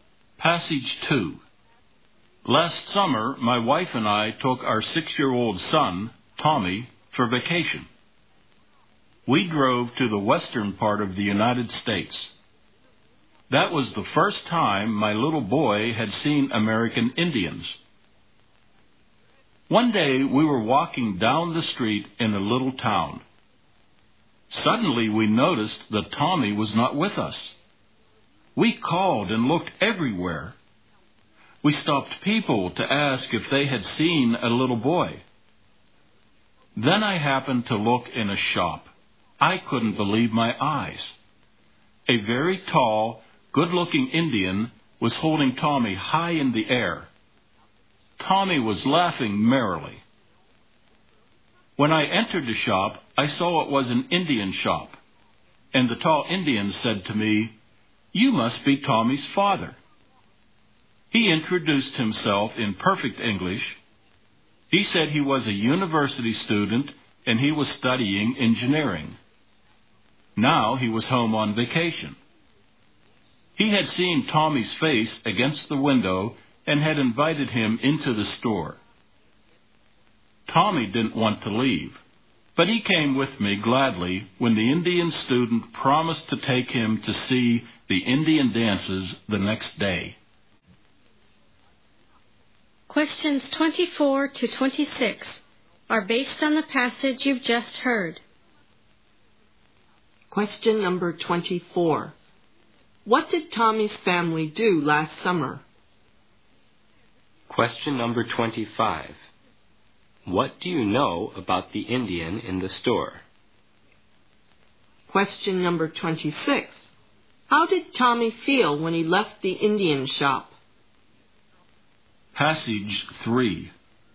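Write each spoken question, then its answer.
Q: What did Tommy's family do last summer?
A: They drove to the western US on vacation

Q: What do you know about the Indian in the store?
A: He was a university student studying engineering

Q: How did Tommy feel when he left the Indian shop?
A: Glad, since he was promised to see Indian dances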